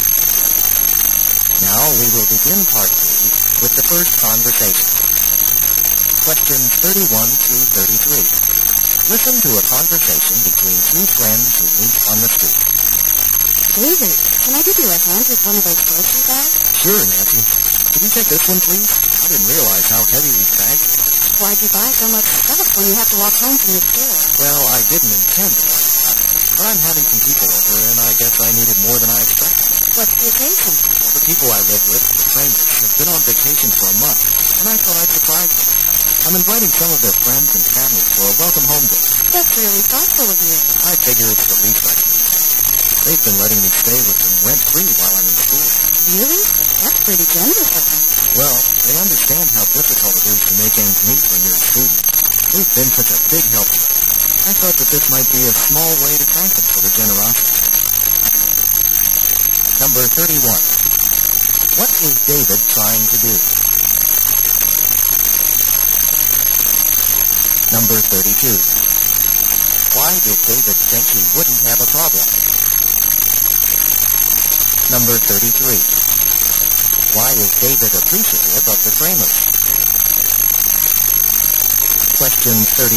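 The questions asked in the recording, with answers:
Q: What is David trying to do?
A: Carry groceries home for a surprise welcome-home dinner for the people he lives with

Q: Why is David appreciative of the framers?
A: They let him stay with them rent-free while he's in school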